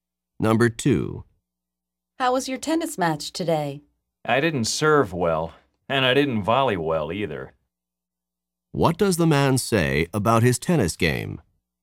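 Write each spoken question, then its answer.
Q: What does the man say about his tennis game?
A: He served and volleyed poorly.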